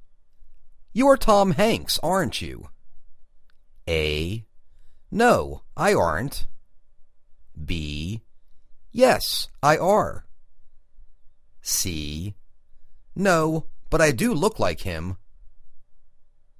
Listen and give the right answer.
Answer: No, but I do look like him